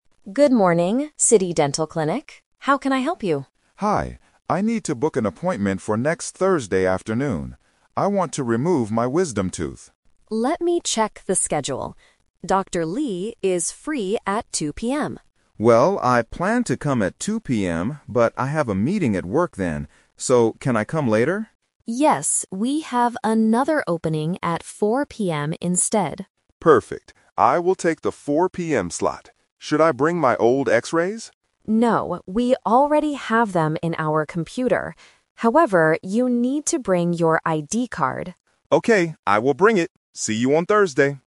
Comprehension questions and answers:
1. Why does the patient want to see the dentist?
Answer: To remove a tooth

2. What time is the patient's appointment?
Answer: 4:00 PM

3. What does the patient need to bring to the clinic?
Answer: His ID card

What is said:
Receptionist: Good morning, City Dental Clinic. How can I help you?
Patient: Hi, I need to book an appointment for next Thursday afternoon. I want to remove my wisdom tooth.
Receptionist: Let me check the schedule. Dr. Lee is free at 2:00 PM.
Patient: Well, I planned to come at 2:00 PM, but I have a meeting at work then. So, can I come later?
Receptionist: Yes, we have another opening at 4:00 PM instead.
Patient: Perfect. I will take the 4:00 PM slot. Should I bring my old X-rays?
Receptionist: No, we already have them in our computer. However, you need to bring your ID card.